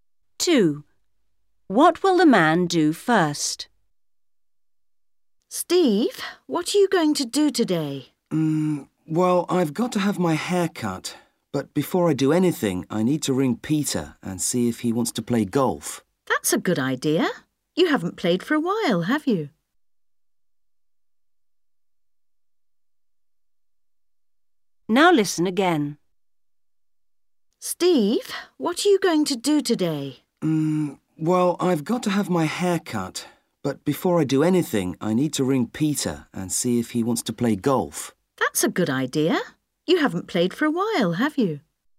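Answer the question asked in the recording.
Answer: ring Peter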